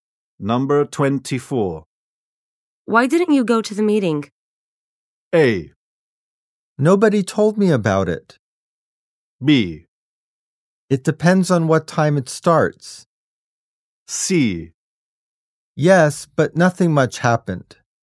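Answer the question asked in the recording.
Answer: A: Nobody told me about it.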